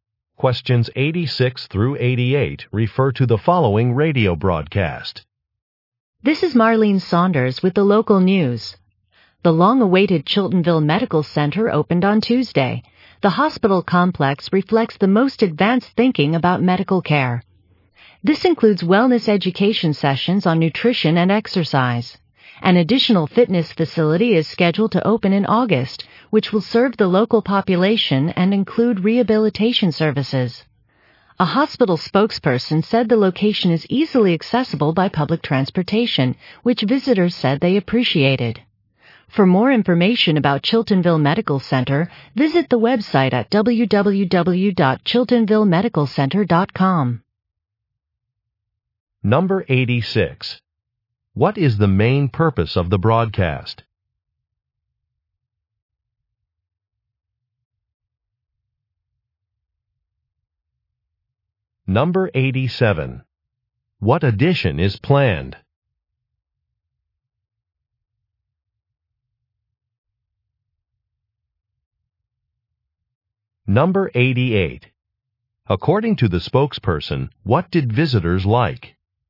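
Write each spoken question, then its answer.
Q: What is the main purpose of the broadcast?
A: To report the opening of a medical center

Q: What edition is planned?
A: A fitness facility

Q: According to the spokesperson, what did visitors like?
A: Easy access by public transportation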